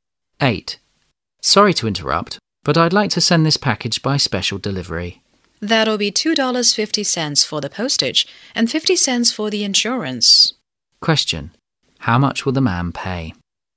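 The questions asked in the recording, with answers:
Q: How much will the man pay?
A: $3.00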